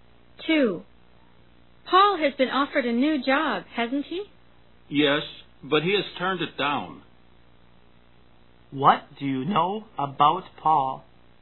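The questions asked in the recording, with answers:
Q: What do you know about Paul?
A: He turned down a new job offer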